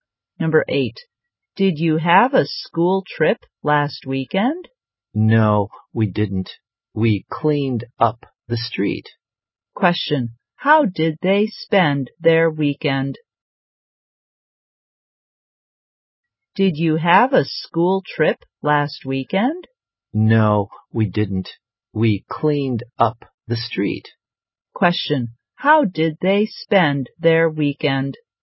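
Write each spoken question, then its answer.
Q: How did they spend their weekend?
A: They cleaned up the street.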